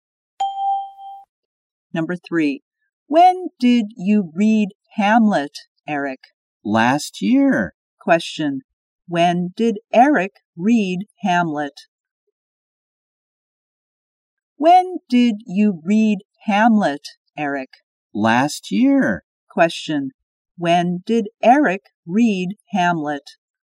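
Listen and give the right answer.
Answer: Last year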